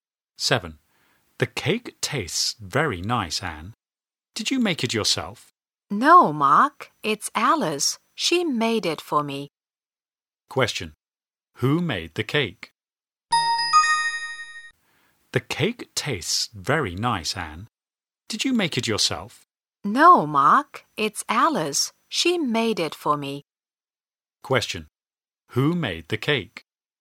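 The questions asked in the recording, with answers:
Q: Who made the cake?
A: Alice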